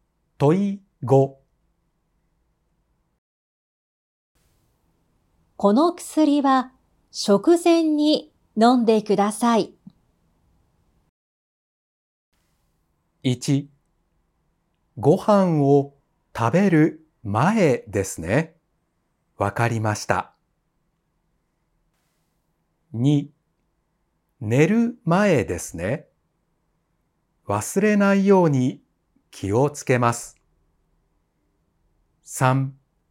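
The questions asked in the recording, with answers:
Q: この薬は食前に飲んでください。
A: 1: ご飯を食べる前ですね。わかりました。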